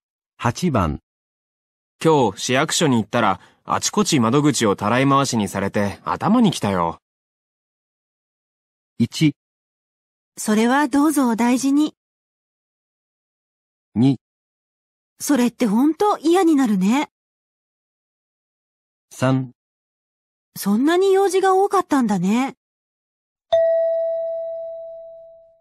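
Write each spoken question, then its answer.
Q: 今日市役所に行ったら、あちこち窓口をたらい回しにされて頭に来たよ。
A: 2: それって本当嫌になるね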